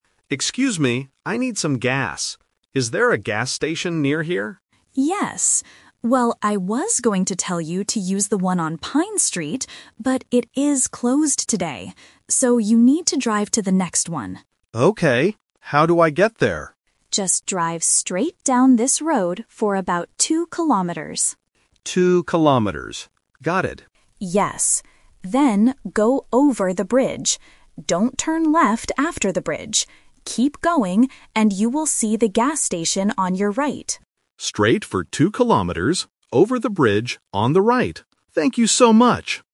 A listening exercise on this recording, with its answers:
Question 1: Why can't the driver use the gas station on Pine Street?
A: Because it is closed today.

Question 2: What does the driver need to go over?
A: A bridge.

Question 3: Where is the gas station located?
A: On the right side.

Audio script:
Driver: Excuse me, I need some gas. Is there a gas station near here?
Pedestrian: Yes. Well, I was going to tell you to use the one on Pine Street, but it is closed today. So, you need to drive to the next one.
Driver: Okay. How do I get there?
Pedestrian: Just drive straight down this road for about two kilometers.
Driver: Two kilometers. Got it.
Pedestrian: Yes. Then, go over the bridge. Don't turn left after the bridge. Keep going, and you will see the gas station on your right.
Driver: Straight for two kilometers, over the bridge, on the right. Thank you so much!